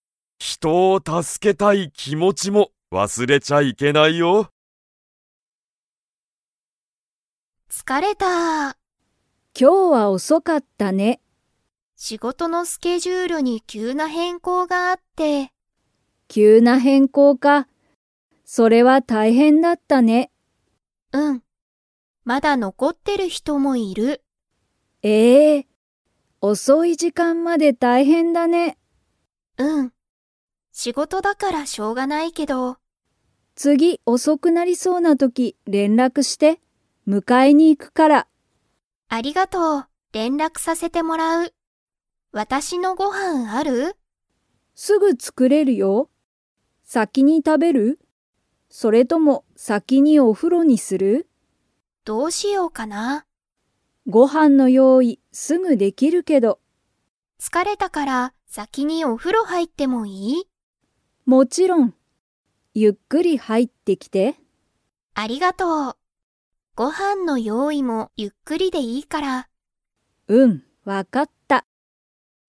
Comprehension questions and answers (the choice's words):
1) 仕事しごとのスケジュールに急きゅうな があった。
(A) お風呂ふろ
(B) 疲つかれ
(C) ご飯はん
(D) 変更へんこう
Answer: 変更へんこう

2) サヤは、先さきにご飯はんを食たべますか?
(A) はい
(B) いいえ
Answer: いいえ

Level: Level 4